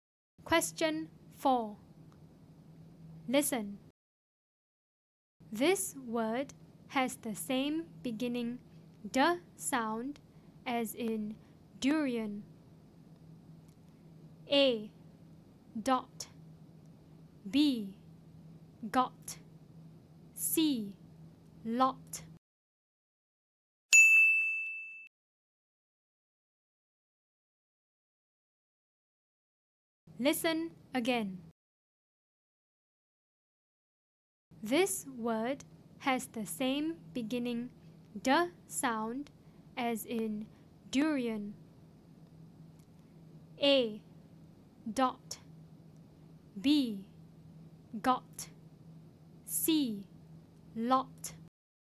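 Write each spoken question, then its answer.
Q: This word has the same beginning d sound as in durian.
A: A: Dot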